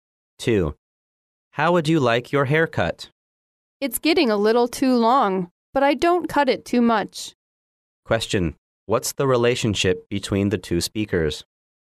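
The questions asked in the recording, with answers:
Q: What's the relationship between the two speakers?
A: Hairdresser and customer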